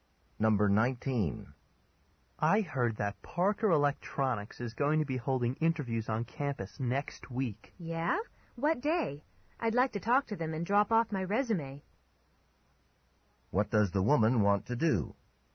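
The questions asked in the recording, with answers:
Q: What does the woman want to do?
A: Talk to Parker Electronics and drop off her resume.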